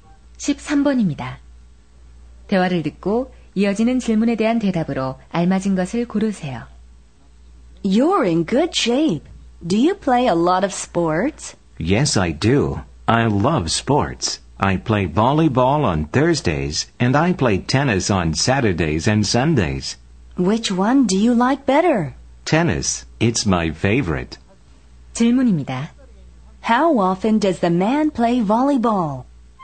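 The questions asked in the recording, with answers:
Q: How often does the man play volleyball?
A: Once a week, on Thursdays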